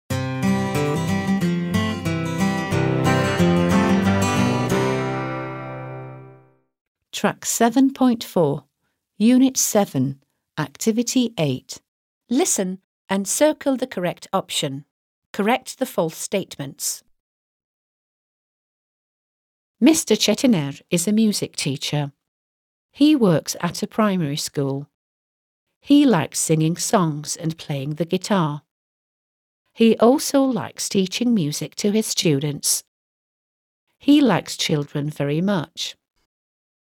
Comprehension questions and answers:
8. Listen and circle the correct option.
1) Mr. Çetiner is a singer.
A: FALSE

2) He works in an office.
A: FALSE

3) He likes playing the guitar.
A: TRUE

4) He works at a school.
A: TRUE

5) He likes teaching English.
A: FALSE

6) He likes children very much.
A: TRUE

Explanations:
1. He is a music teacher. (O bir müzik öğretmeni.)
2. He works at a (primary) school. (Bir (ilk)okulda çalışıyor.)
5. He likes teaching music. (Müzik öğretmeyi seviyor.)

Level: 4. Sınıf